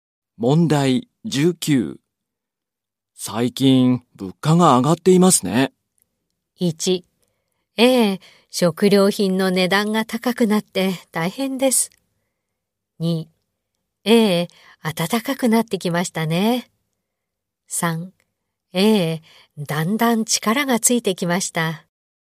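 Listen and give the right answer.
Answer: 1: ええ。食料品の値段が高くなって大変です。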